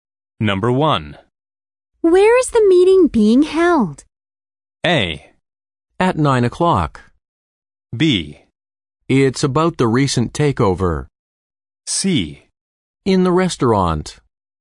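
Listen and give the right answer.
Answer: C: In the restaurant.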